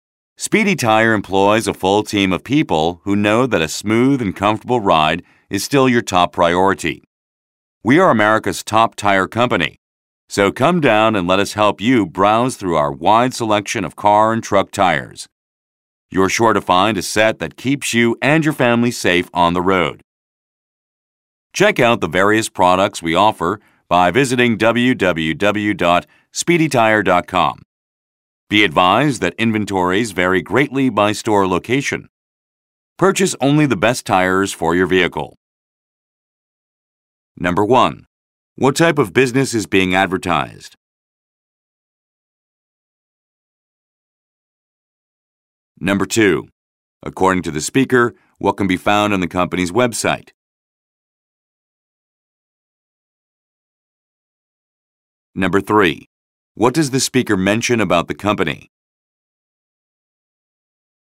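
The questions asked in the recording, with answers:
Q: What type of business is being advertised?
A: A tire company

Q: According to the speaker, what can be found on the company's website?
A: The various products the company offers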